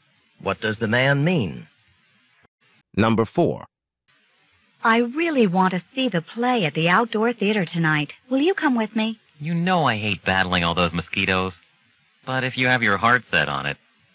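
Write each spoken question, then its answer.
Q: What can be inferred about the man?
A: He will go to the play with her despite disliking mosquitoes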